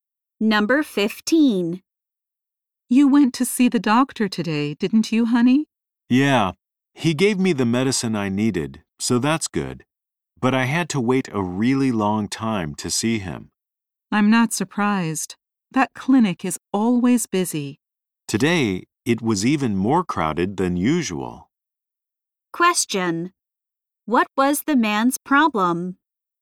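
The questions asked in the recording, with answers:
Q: What was the man's problem?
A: He had to wait a long time to see the doctor.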